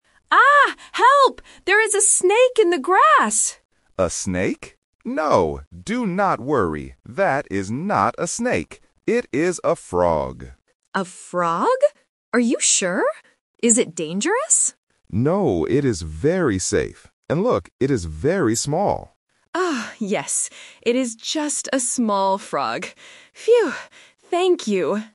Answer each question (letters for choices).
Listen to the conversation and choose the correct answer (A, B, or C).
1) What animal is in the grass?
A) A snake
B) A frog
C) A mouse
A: B

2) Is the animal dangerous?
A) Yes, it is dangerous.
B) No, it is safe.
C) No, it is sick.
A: B

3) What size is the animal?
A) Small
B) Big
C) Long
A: A

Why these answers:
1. The guide explicitly says, "It is a frog". Option (A) "A snake" is a trap because the tourist screams and thinks it is a snake at first, but the guide says "That is not a snake." Option (C) is a plausible nature word but is not mentioned.
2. The tourist asks, "Is it dangerous?" but the guide rejects this and answers, "No, it is very safe." Option (A) is the trap. Option (C) is not mentioned.
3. The guide points out, "it is very small," and the tourist agrees, "It is just a small frog." Options (B) and (C) are size adjectives but are not used in the audio.

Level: A1